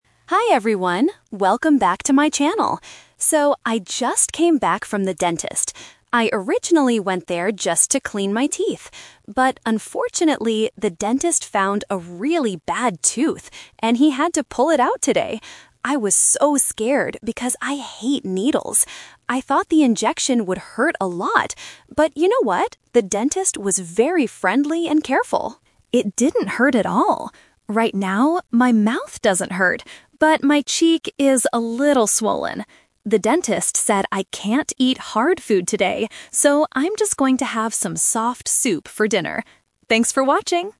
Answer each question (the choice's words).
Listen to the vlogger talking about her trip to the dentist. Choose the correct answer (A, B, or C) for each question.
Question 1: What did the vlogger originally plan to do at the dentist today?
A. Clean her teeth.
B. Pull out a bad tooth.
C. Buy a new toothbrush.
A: Clean her teeth.

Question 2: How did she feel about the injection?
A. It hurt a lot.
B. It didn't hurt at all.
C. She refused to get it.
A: It didn't hurt at all.

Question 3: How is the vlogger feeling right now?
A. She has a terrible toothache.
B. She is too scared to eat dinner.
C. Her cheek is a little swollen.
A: Her cheek is a little swollen.

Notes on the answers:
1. The vlogger clearly says, "I originally went there just to clean my teeth." Trap B is wrong (The Twist): Pulling out a bad tooth is what actually happened, but it was not her original plan. Trap C is wrong: Buying a toothbrush is a plausible action at a dentist, but it is not mentioned in the audio.
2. She says the dentist was careful and "It didn't hurt at all!" Trap A is wrong (Expectation Trap): She says "I thought the injection would hurt a lot," but in reality, it did not. Trap C is wrong: She says she hates needles and was scared, but she didn't refuse the injection.
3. The vlogger states her current condition: "Right now... my cheek is a little swollen." Trap A is wrong: She explicitly says, "my mouth doesn't hurt," so she does not have a toothache. Trap B is wrong: She is not too scared to eat; she says she is "going to have some soft soup for dinner."

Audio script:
Vlogger: Hi everyone, welcome back to my channel! So, I just came back from the dentist. I originally went there just to clean my teeth. But, unfortunately, the dentist found a really bad tooth, and he had to pull it out today! I was so scared because I hate needles. I thought the injection would hurt a lot. But you know what? The dentist was very friendly and careful. Right now, my mouth doesn't hurt, but my cheek is a little swollen. The dentist said I can't eat hard food today, so I'm just going to have some soft soup for dinner. Thanks for watching!